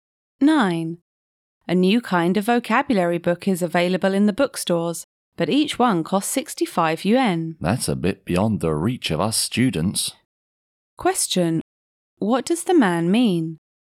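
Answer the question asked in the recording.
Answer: The book is too expensive for students.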